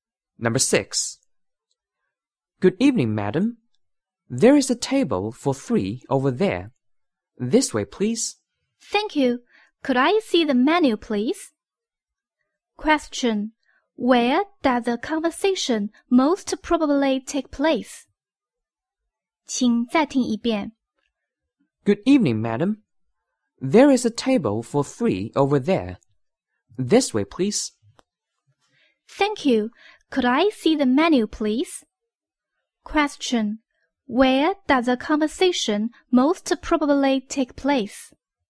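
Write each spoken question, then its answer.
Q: Where does the conversation most probably take place?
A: In a restaurant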